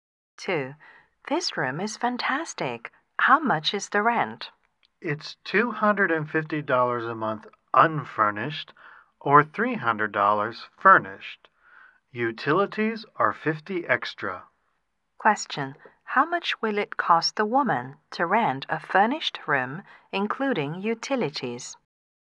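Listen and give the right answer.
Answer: $350 a month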